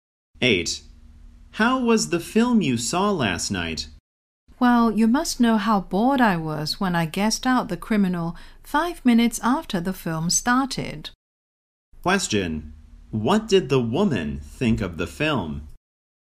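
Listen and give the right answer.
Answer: It was boring and predictable.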